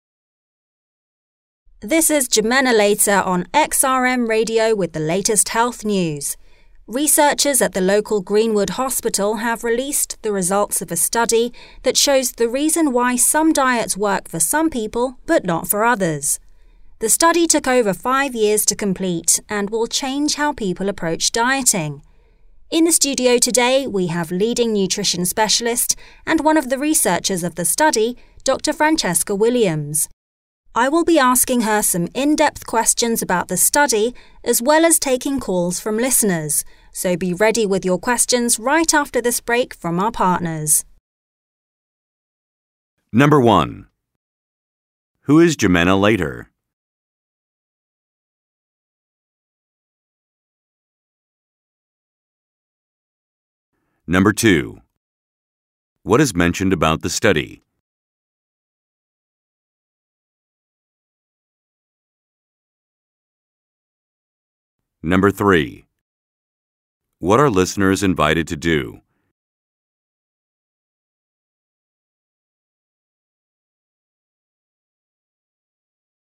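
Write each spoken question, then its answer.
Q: Who is Jimena Leiter?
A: A radio host

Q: What are listeners invited to do?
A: Call in with questions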